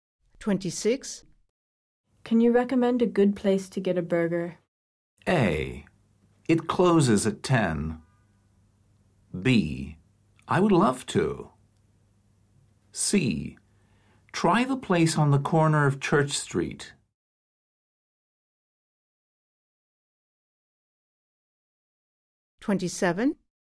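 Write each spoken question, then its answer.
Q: Can you recommend a good place to get a burger?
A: C: Try the place on the corner of Church Street.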